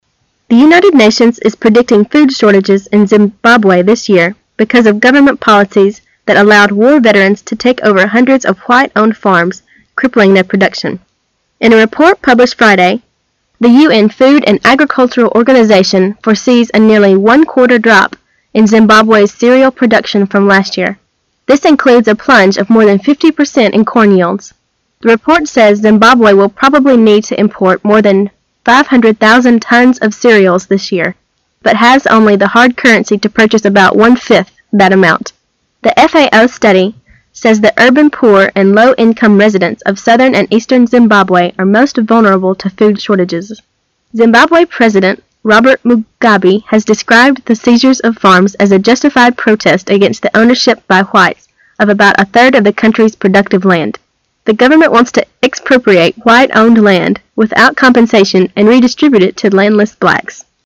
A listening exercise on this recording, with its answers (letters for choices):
Questions 24 to 26 are based on the following news. At the end of the news item, you will be given 15 seconds to answer the three questions. Now listen to the news.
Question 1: According to the U.N. Food and Agricultural Organization, how much will Zimbabwe's cereal production drop from last year?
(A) 25%.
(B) 15%.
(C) 50%.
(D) 20%.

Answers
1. A

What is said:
A
[解析] 24-26 The United Nations is predicting food shortages in Zimbabwe this year because of government policies that al-lowed war veterans to take over hundreds of white owned farms, crippling their production. In a report published Friday, the U.N. Food and Ag-ricultural Organization foresees a nearly one-quarter drop in Zimbabwe's cereal production from last year. This includes a plunge of more than 50 percent in corn yields. The report says Zimbabwe will probably need to import more than 500,000 tons of cereals this year, but has only the hard currency to purchase about one-fifth that amount. The FAO study says the urban poor and low-income residents of southern and eastern Zimbabwe are most vulnerable to food shortages. Zimbabwe President Robert Mugabe has described the seizure of farms as a justified protest against the ownership by whites of about a third of the country's productive land. The government wants to expropriate white-owned land without compensation and redistribute it to landless blacks.